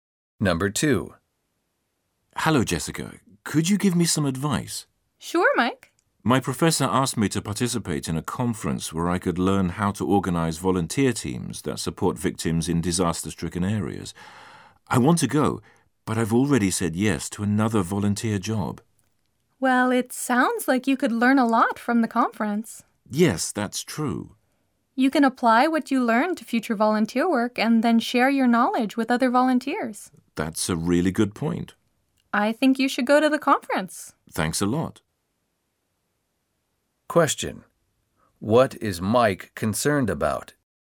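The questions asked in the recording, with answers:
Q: What is Mike concerned about?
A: He has already agreed to another volunteer job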